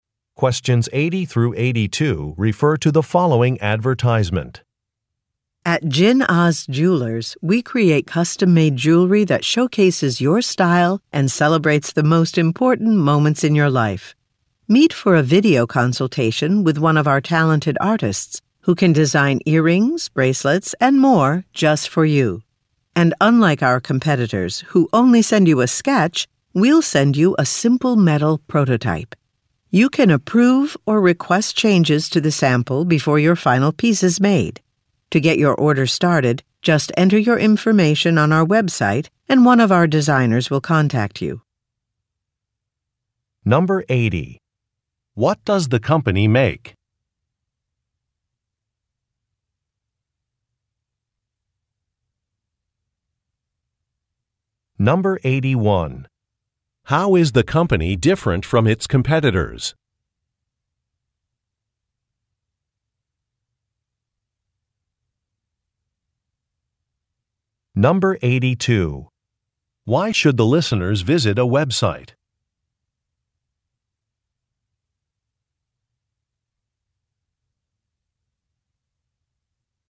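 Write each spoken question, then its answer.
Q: What does the company make?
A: Custom-made jewelry

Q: How is the company different from its competitors?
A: It sends a simple metal prototype instead of only a sketch

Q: Why should the listeners visit a website?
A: To enter their information to start an order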